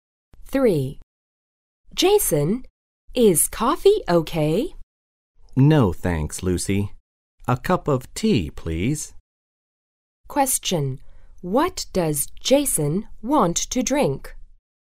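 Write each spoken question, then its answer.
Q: What does Jason want to drink?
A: Tea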